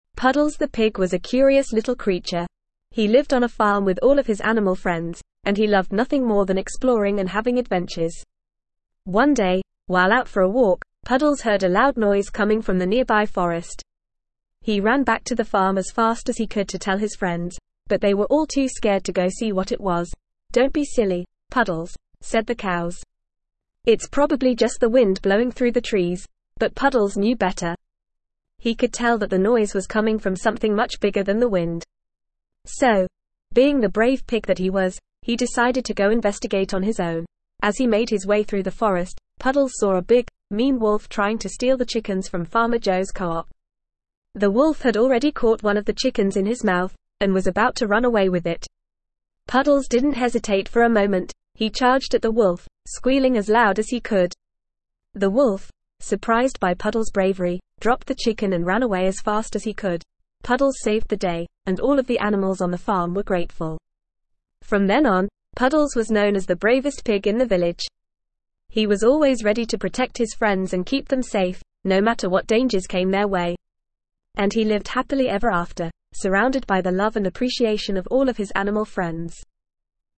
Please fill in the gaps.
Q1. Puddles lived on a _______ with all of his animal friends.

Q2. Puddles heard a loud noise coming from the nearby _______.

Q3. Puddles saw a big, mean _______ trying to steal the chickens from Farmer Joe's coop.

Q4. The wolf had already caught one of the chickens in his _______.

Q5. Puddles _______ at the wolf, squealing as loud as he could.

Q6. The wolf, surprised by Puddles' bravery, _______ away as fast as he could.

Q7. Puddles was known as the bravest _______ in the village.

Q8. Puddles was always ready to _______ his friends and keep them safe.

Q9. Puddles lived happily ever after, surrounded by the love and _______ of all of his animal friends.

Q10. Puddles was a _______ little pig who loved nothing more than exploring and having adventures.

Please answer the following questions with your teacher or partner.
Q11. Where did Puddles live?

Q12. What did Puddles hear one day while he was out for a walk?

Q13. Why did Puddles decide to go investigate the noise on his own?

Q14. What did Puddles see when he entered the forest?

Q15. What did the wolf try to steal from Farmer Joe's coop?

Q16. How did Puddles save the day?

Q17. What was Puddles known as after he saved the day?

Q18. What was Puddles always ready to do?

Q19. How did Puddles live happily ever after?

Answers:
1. farm
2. forest
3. wolf
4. mouth
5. charged
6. ran
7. pig
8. protect
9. appreciation
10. curious
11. Puddles lived on a farm.
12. Puddles heard a loud noise coming from the nearby forest.
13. Puddles knew that the noise was coming from something much bigger than the wind, so he decided to go investigate on his own.
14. Puddles saw a big, mean wolf trying to steal the chickens from Farmer Joe's coop.
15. The wolf tried to steal the chickens from Farmer Joe's coop.
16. Puddles charged at the wolf, squealing as loud as he could, and the wolf ran away.
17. After he saved the day, Puddles was known as the bravest pig in the village.
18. Puddles was always ready to protect his friends and keep them safe.
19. Puddles lived happily ever after, surrounded by the love and appreciation of all of his animal friends.

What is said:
Puddles the pig was a curious little creature. He lived on a farm with all of his animal friends, and he loved nothing more than exploring and having adventures. One day, while out for a walk, Puddles heard a loud noise coming from the nearby forest. He ran back to the farm as fast as he could to tell his friends, but they were all too scared to go see what it was.
"Don't be silly, Puddles," said the cows. "It's probably just the wind blowing through the trees."
But Puddles knew better. He could tell that the noise was coming from something much bigger than the wind. So, being the brave pig that he was, he decided to go investigate on his own.
As he made his way through the forest, Puddles saw a big, mean wolf trying to steal the chickens from Farmer Joe's coop. The wolf had already caught one of the chickens in his mouth, and was about to run away with it. Puddles didn't hesitate for a moment – he charged at the wolf, squealing as loud as he could. The wolf, surprised by Puddles' bravery, dropped the chicken and ran away as fast as he could.
Puddles saved the day, and all of the animals on the farm were grateful. From then on, Puddles was known as the bravest pig in the village. He was always ready to protect his friends and keep them safe, no matter what dangers came their way. And he lived happily ever after, surrounded by the love and appreciation of all of his animal friends.

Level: Level 2